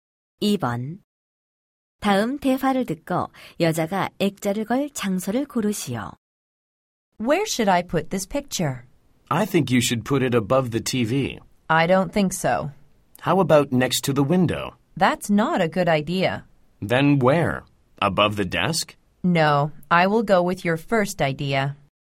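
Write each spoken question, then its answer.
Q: 다음 대화를 듣고 여자가 액자를 걸 장소를 고르시오.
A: TV 위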